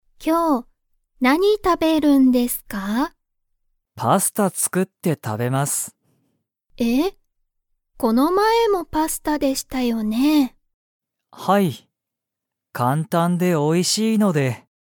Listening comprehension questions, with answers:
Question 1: 小島こじまさんは、今日きょう、パスタを____。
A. 買かって食たべる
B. 作つくって食たべる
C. 作つくってない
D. 買かいたい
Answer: 作つくって食たべる

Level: Level 1

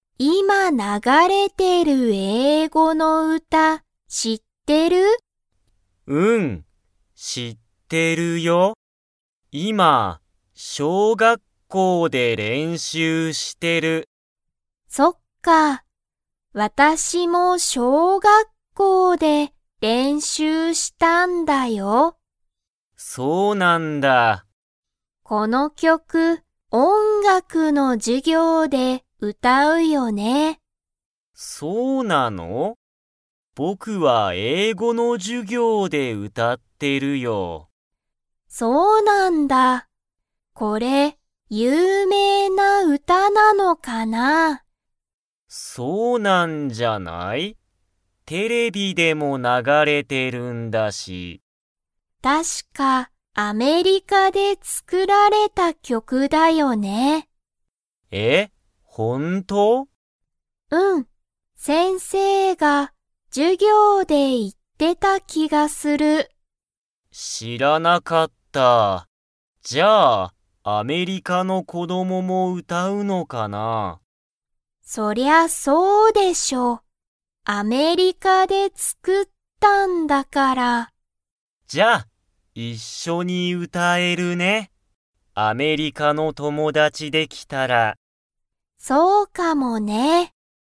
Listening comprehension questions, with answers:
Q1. ユイナはこの曲きょくを の授業じゅぎょうで歌うたった。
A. 大学だいがく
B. 英語えいご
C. 音楽おんがく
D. アメリカ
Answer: 音楽おんがく

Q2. この曲きょくは、日本にほんで作つくられましたか?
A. はい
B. いいえ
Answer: いいえ

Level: Level 3

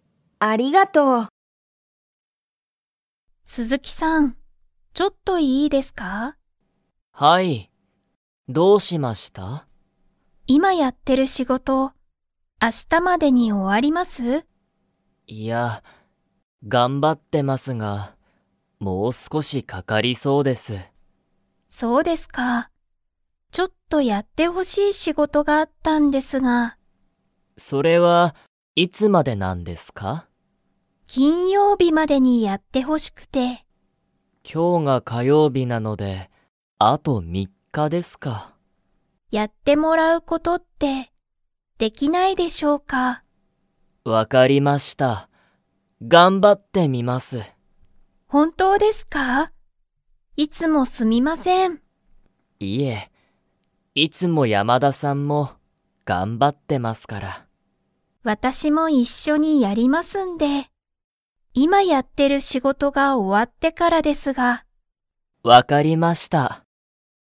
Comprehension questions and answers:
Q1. 鈴木すずきさんは、山田やまださんに____仕事しごとがある。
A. ちょっとやってほしい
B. あまりやってほしくない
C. 今いますぐやりたい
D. 今いままだやりたくない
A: ちょっとやってほしい

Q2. 今日きょうは、金曜日きんようびですか?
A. はい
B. いいえ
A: いいえ

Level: Level 2

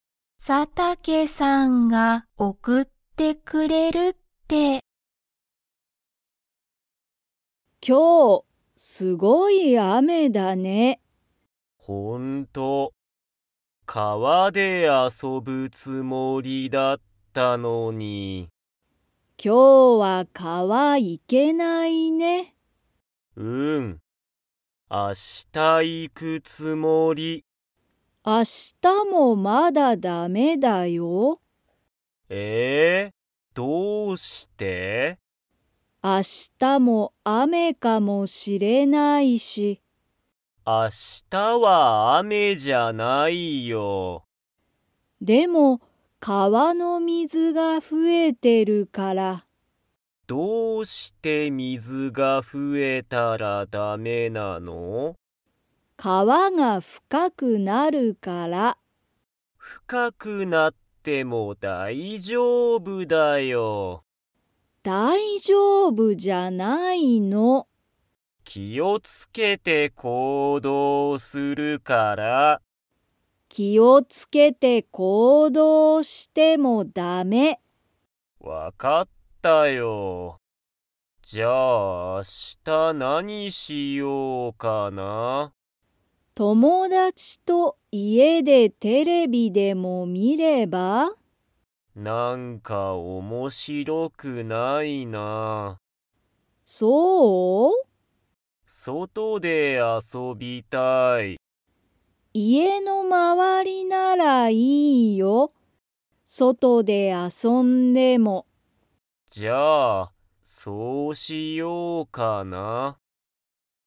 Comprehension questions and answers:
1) ツトムは、今日きょう川かわに 。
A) 行いく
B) 行いかない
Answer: 行いかない

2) ツトムは明日あしたどこで遊あそびたいですか?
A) 家いえ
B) 駅えき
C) 車くるま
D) 外そと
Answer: 外そと

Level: Level 3

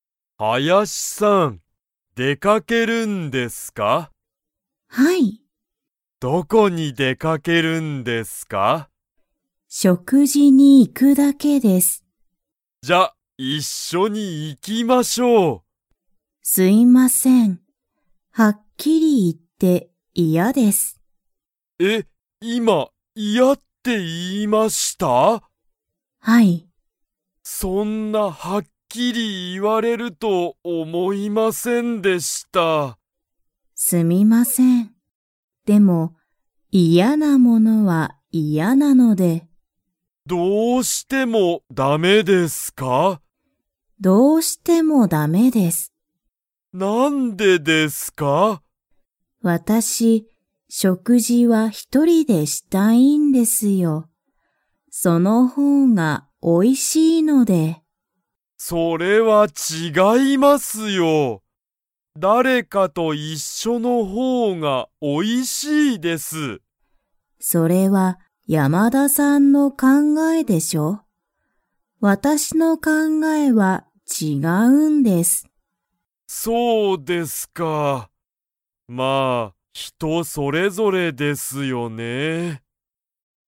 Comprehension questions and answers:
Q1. 林はやしさんは、これから何なにをしますか?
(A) 仕事しごと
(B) デート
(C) 食事しょくじ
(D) 勉強べんきょう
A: 食事しょくじ

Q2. 林はやしさんは、誰だれかと一緒いっしょに食事しょくじを 。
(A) したい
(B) したくない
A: したくない

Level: Level 3

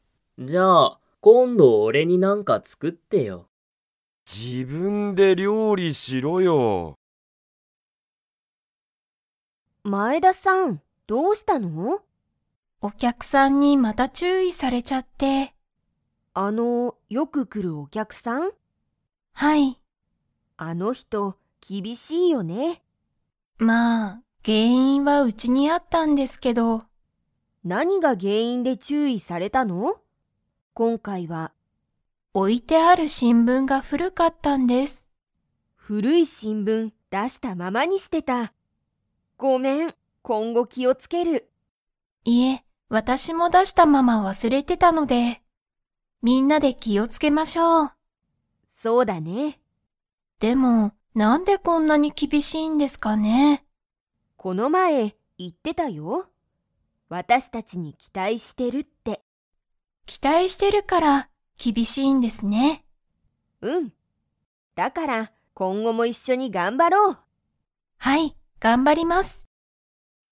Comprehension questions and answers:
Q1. 前田まえださんは、お客きゃくさんに注意ちゅういされましたか?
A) はい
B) いいえ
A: はい

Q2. 新聞しんぶんを出だしたままにしていた。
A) 大おおきい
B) 小ちいさい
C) 新あたらしい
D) 古ふるい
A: 古ふるい

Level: Level 3

